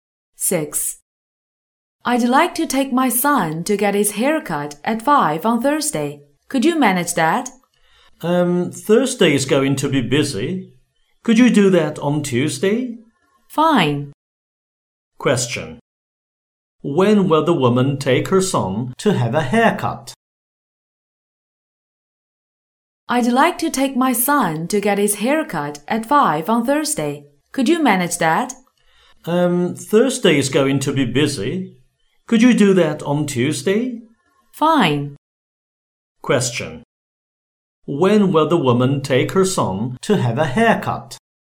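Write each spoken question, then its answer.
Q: When will the woman take her son to have a haircut?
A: At 5 on Tuesday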